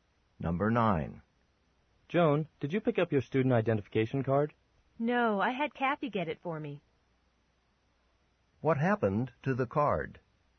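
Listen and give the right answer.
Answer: Kathy picked it up for Joan.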